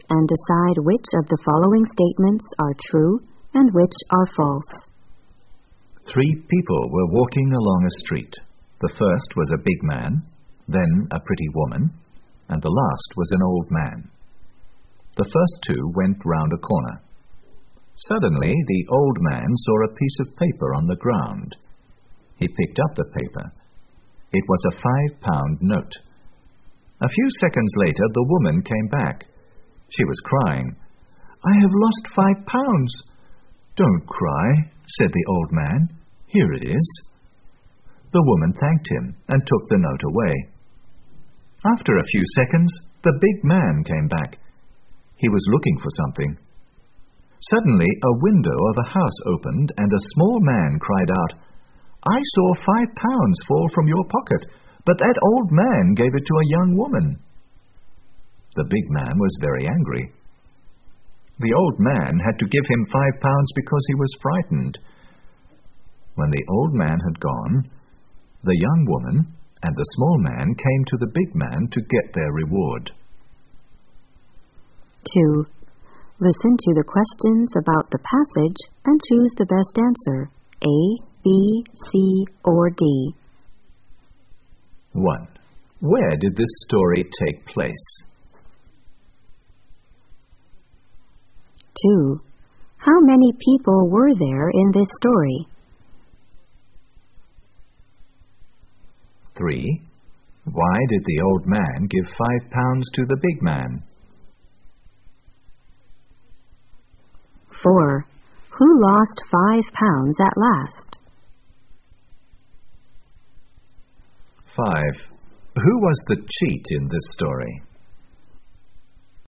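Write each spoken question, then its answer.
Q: Where did this story take place?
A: In a street

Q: Why did the old man give 5 pounds to the big man?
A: Because he was frightened

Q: Who lost 5 pounds at last?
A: The old man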